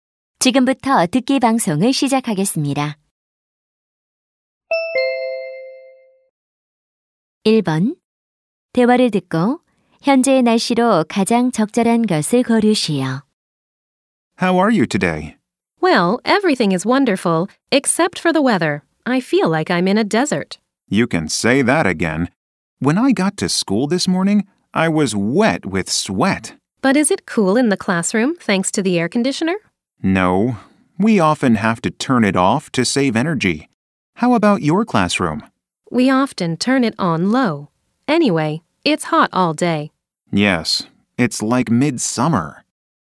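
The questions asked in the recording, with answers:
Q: 대화를 듣고 현재의 날씨로 가장 적절한 것을 고르시오.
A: 매우 덥다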